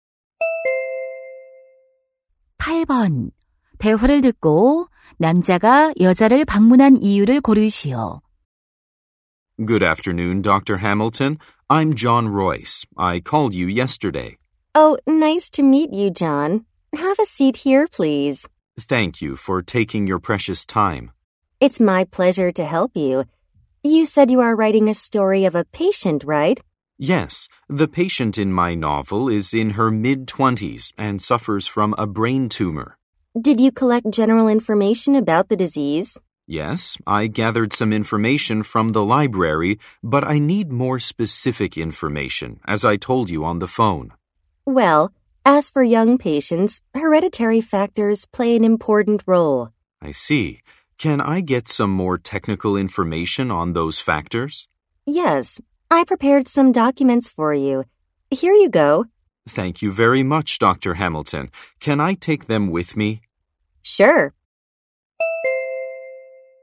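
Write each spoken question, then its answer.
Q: 대화를 듣고 남자가 여자를 방문한 이유를 고르시오.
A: 소설 집필을 위해 뇌종양에 관한 전문 정보를 얻으려고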